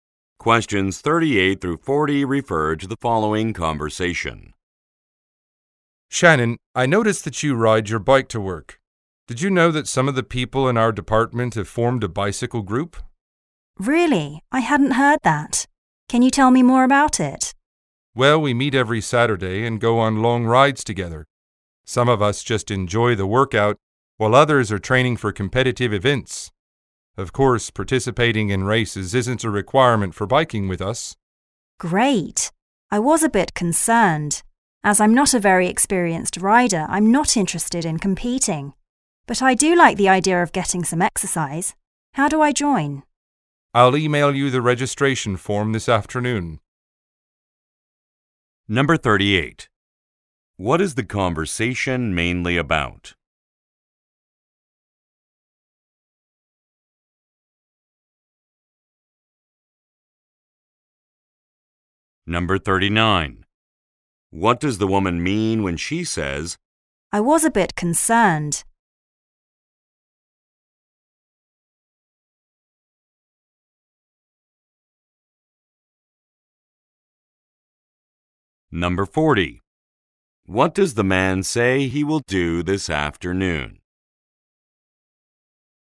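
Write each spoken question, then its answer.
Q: What is the conversation mainly about?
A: A bicycle group

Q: What does the woman mean when she says,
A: She was worried she would have to take part in races

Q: What does the man say he will do this afternoon?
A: Email her the registration form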